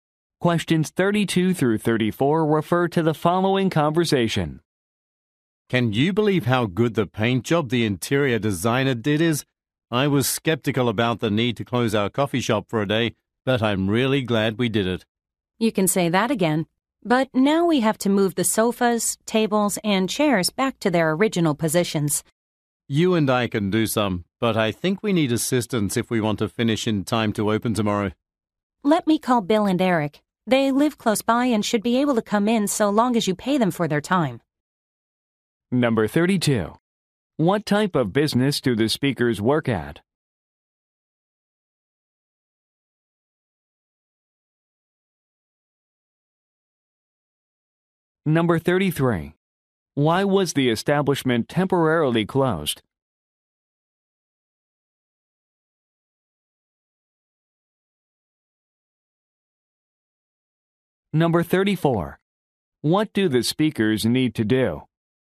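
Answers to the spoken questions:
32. A coffee shop
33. To have the interior painted
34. Move the furniture back to its original positions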